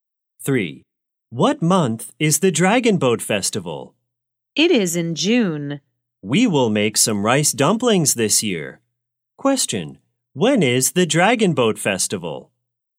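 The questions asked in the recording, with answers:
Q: Question, when is the Dragon Boat Festival?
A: In June.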